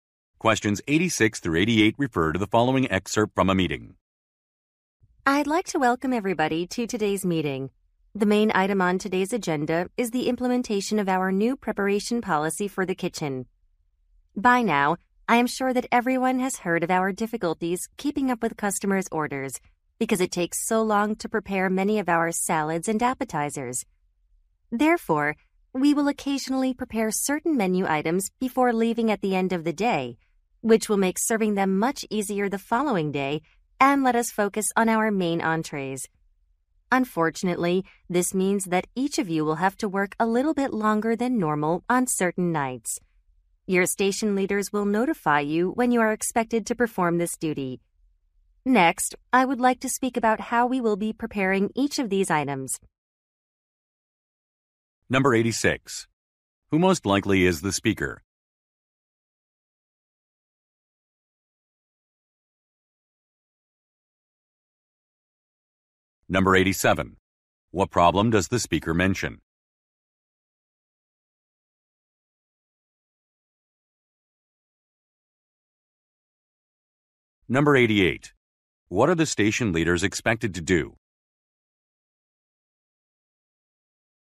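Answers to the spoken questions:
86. A restaurant kitchen manager
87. Orders take too long because salads and appetizers are slow to prepare
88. Tell staff when they must stay late to prepare items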